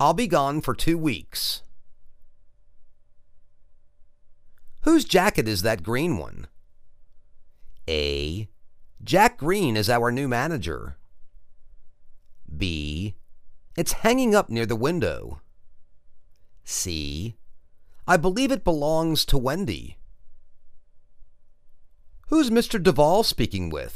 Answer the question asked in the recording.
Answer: I believe it belongs to Wendy.